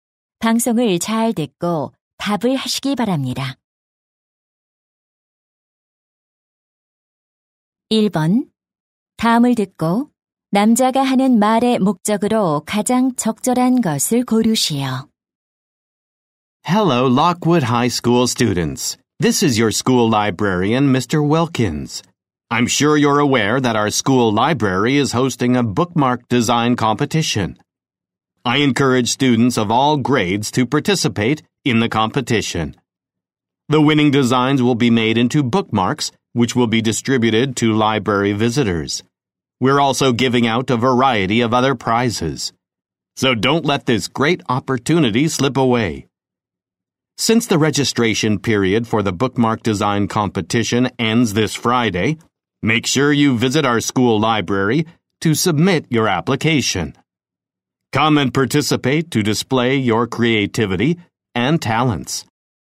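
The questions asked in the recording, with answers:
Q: 다음을 듣고 남자가 하는 말의 목적으로 가장 적절한 것을 고르시오.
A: 책갈피 디자인 대회 참가를 독려하려고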